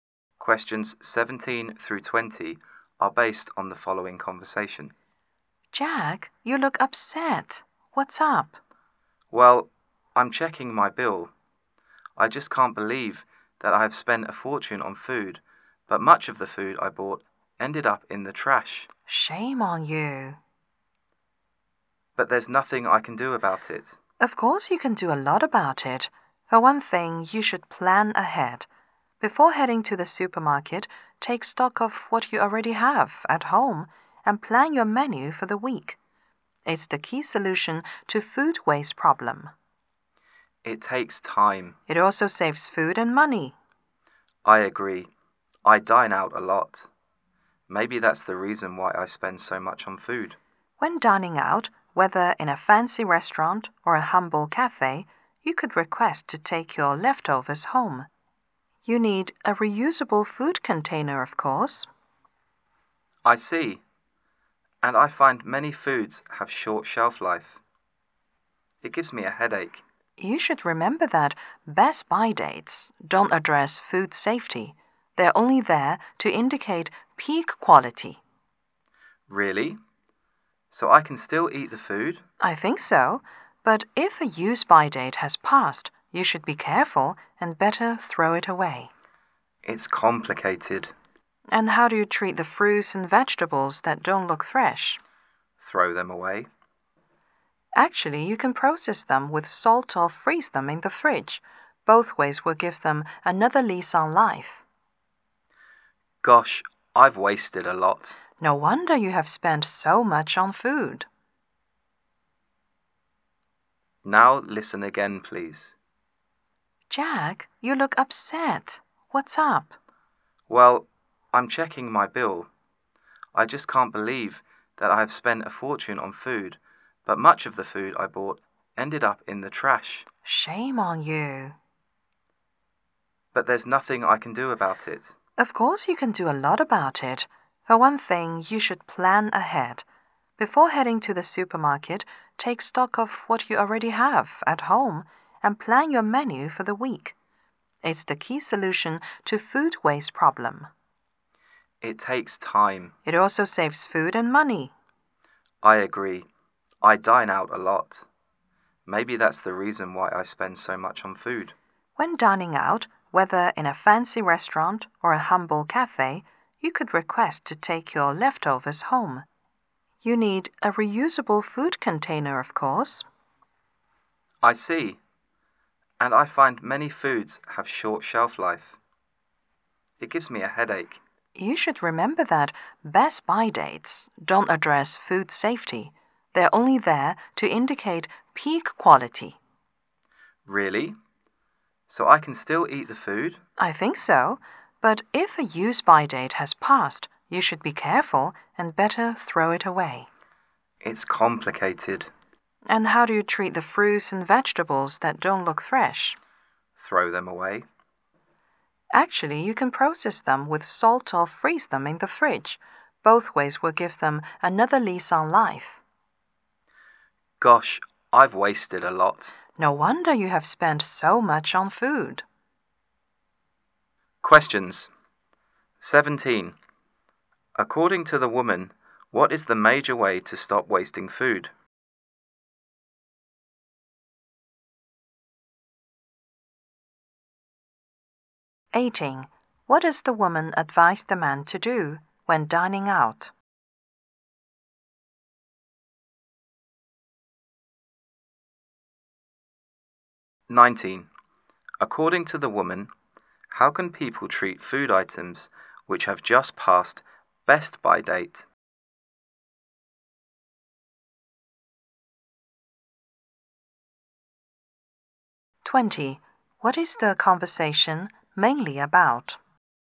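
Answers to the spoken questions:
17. Plan ahead: check what you have at home and plan the week's menu before shopping.
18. Take the leftovers home in a reusable container.
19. They can still eat them.
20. Ways to reduce food waste.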